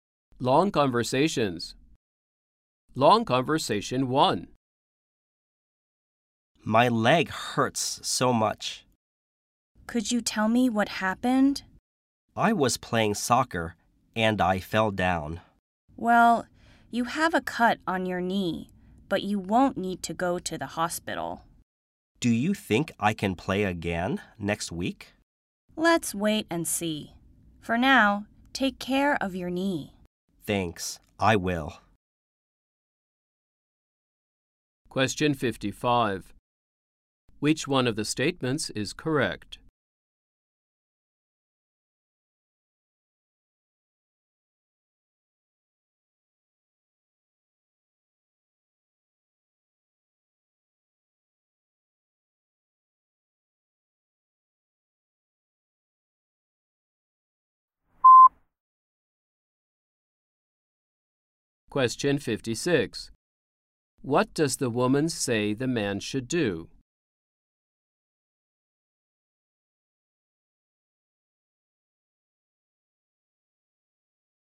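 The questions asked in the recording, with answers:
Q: What does the woman say the man should do?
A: Take care of his knee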